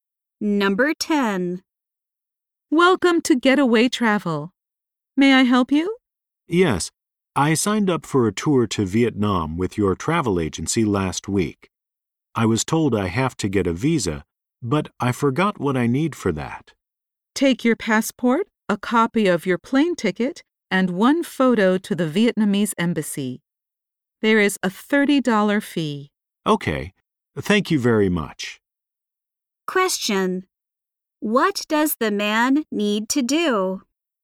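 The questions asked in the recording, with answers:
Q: What does the man need to do?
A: Take his passport, a copy of his plane ticket and one photo to the Vietnamese embassy to get a visa.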